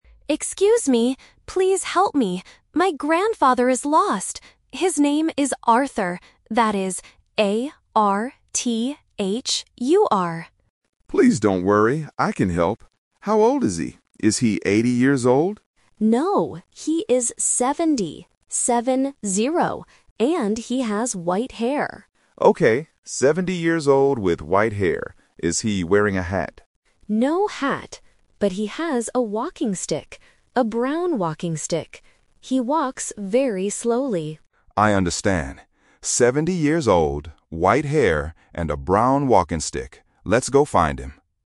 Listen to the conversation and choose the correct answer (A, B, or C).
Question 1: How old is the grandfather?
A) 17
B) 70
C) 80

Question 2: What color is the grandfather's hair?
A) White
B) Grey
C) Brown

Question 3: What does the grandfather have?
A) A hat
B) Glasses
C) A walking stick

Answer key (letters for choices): 1B, 2A, 3C

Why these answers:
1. The relative clearly says, "No, he is 70. Seven-zero."
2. The relative states that "he has white hair."
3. The relative says, "But he has a walking stick."

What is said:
Relative: Excuse me, please help me! My grandfather is lost. His name is Arthur. That is A-R-T-H-U-R.
Guard: Please don't worry. I can help. How old is he? Is he 80 years old?
Relative: No, he is 70. Seven-zero. And he has white hair.
Guard: Okay, 70 years old with white hair. Is he wearing a hat?
Relative: No hat. But he has a walking stick. A brown walking stick. He walks very slowly.
Guard: I understand. 70 years old, white hair, and a brown walking stick. Let's go find him.